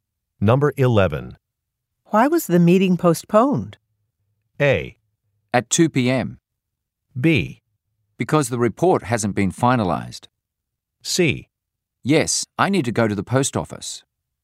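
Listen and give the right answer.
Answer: B: Because the report hasn't been finalized.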